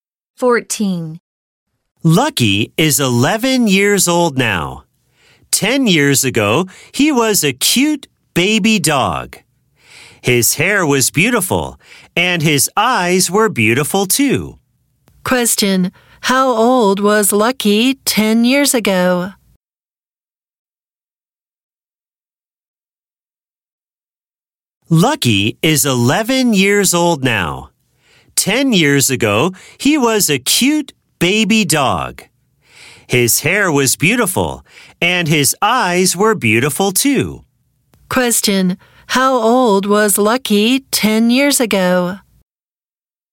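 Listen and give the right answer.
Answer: 1 year old.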